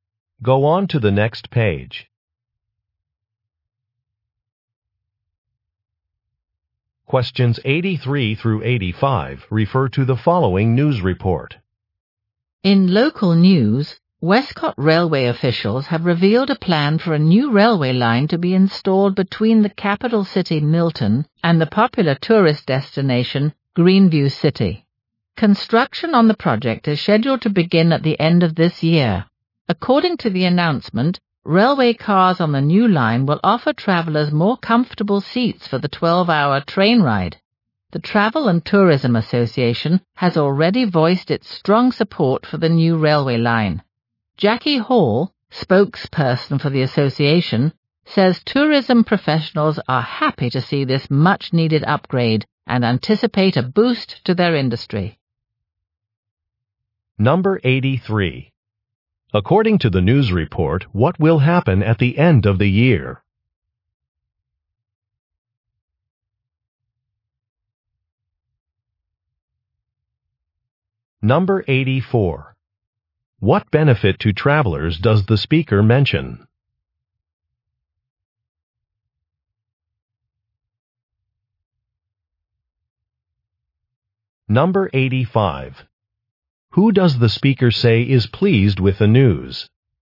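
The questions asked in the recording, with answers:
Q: According to the news report, what will happen at the end of the year?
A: Construction of a new railway line will begin

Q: What benefit to travelers does the speaker mention?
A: More comfortable seats

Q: Who does the speaker say is pleased with the news?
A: Tourism professionals (the Travel and Tourism Association)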